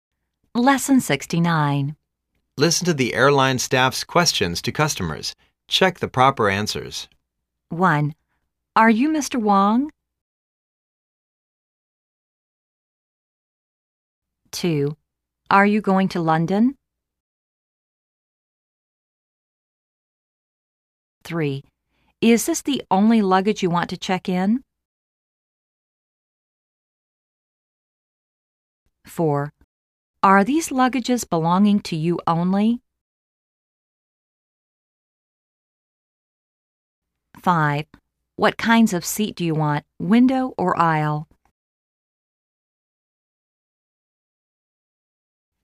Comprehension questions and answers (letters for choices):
Listen to the airline staffs' questions to customers and check the proper answers.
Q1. Are you Mr. Wang?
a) Yes. You are.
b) Yes. I am.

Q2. Are you going to London?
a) Yes. I am.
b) Yes. It is.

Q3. Is this the only luggage you want to check in?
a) Yes. They are.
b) Yes. It is.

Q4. Are these luggages belonging to you only?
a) Yes. It is.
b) Yes. They are.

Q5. What kinds of seat do you want, window or aisle?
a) Seat, please.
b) Window, please.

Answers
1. b
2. a
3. b
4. b
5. b